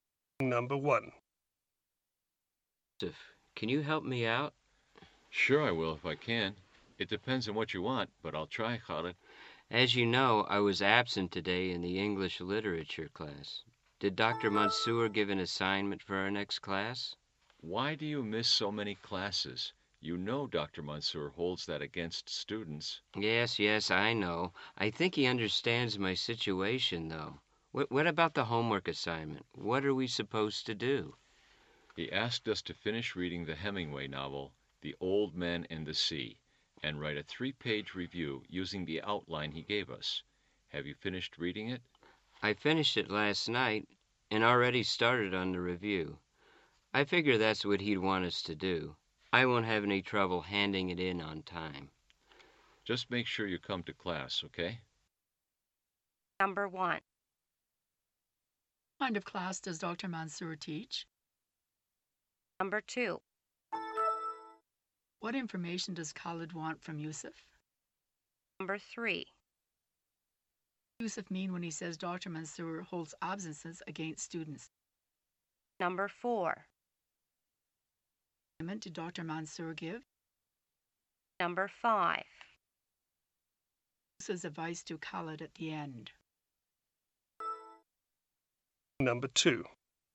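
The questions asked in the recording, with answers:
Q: What kind of class does Dr.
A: English literature

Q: What information does Khalid want from Yusuf?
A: The homework assignment for the next class

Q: Yusuf mean when he says Dr.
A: Dr. Mansour penalizes or dislikes students who miss class

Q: What assignment did Dr. Mansour give?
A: Finish reading The Old Man and the Sea and write a 3-page review

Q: Yusuf's advice to Khalid at the end.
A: Make sure he comes to class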